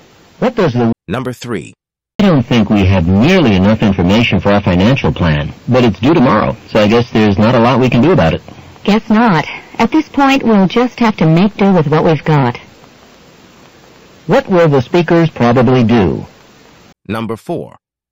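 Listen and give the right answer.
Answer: Finish the plan with the information they have.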